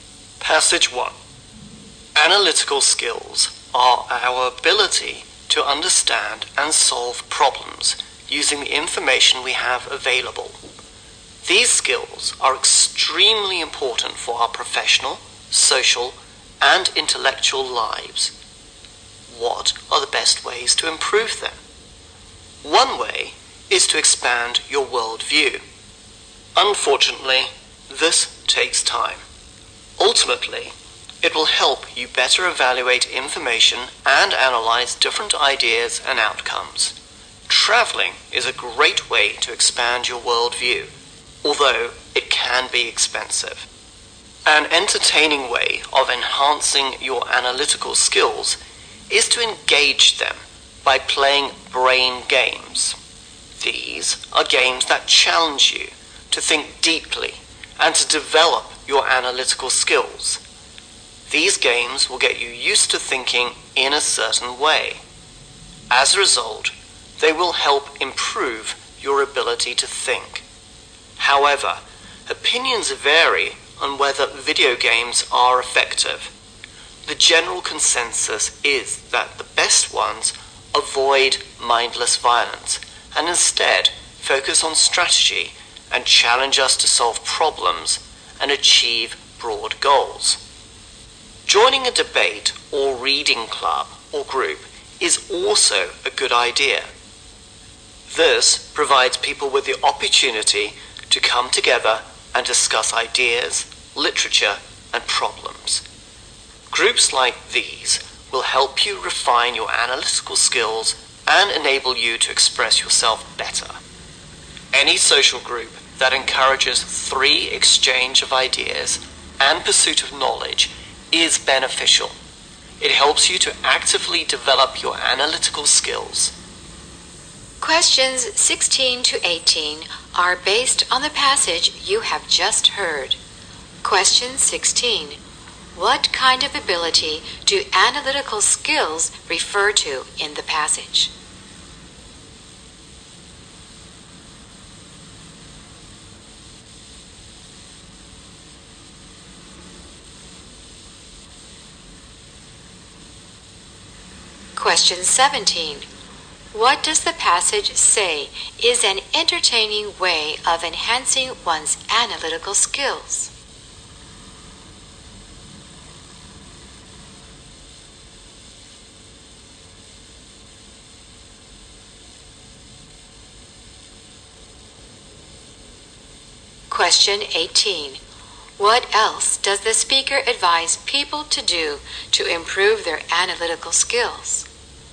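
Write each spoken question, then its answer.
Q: What kind of ability do analytical skills refer to in the passage?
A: The ability to understand and solve problems using available information.

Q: What does the passage say is an entertaining way of enhancing one's analytical skills?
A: Playing brain games.

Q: What else does the speaker advise people to do to improve their analytical skills?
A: Join a debate or reading club or group.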